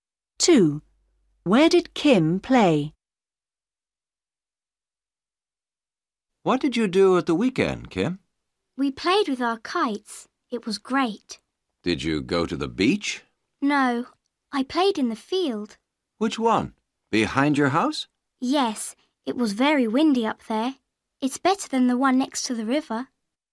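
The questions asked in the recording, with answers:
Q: Where did Kim play?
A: In the field behind her house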